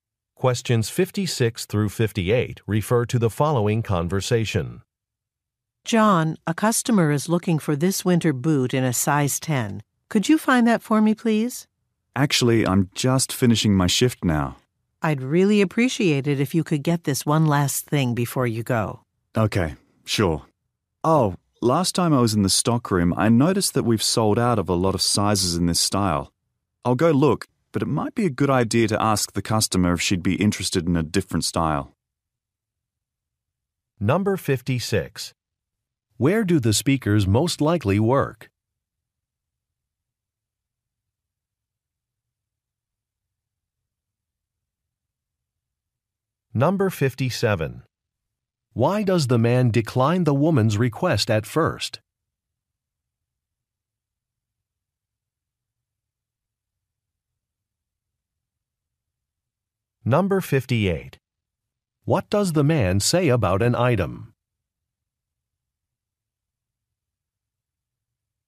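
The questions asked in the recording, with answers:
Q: Where do the speakers most likely work?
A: At a shoe store

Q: Why does the man decline the woman's request at first?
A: His shift is ending

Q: What does the man say about an item?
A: Many sizes are sold out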